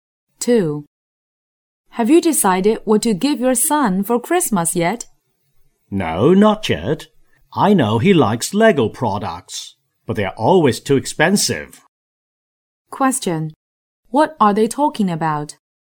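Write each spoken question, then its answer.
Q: What are they talking about?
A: A Christmas present for the son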